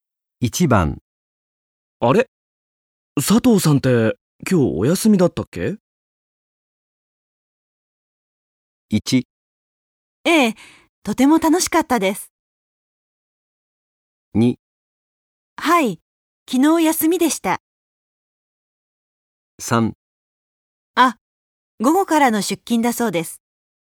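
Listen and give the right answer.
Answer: 3: あ、午後からの出勤だそうです。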